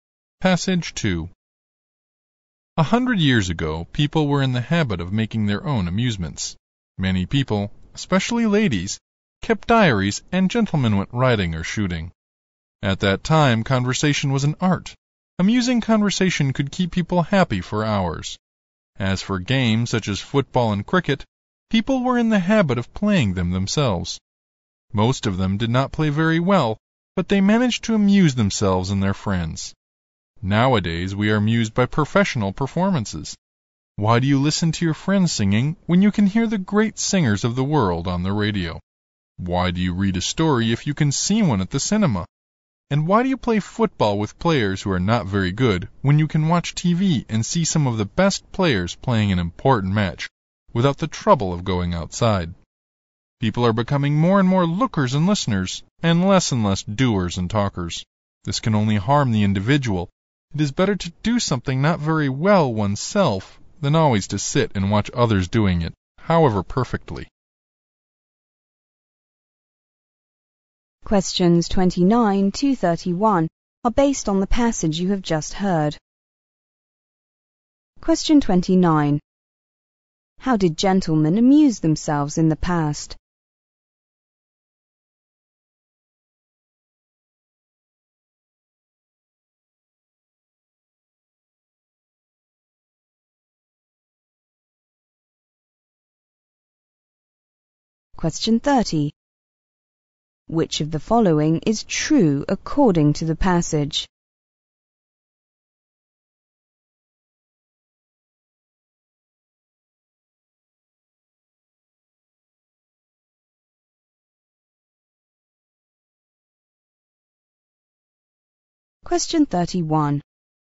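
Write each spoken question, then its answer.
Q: How did gentlemen amuse themselves in the past?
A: By riding or shooting.

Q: What are people's characteristic features when they are amused nowadays?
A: They are more lookers and listeners and less doers and talkers.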